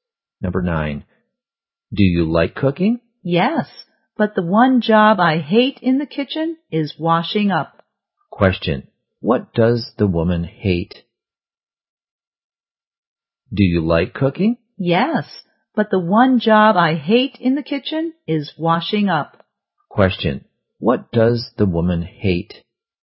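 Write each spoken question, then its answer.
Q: Question. What does the woman hate?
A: Washing up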